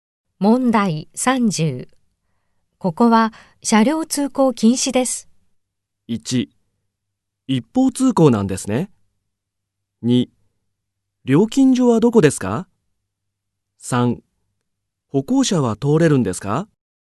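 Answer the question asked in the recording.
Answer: 3: 歩行者は通れるんですか?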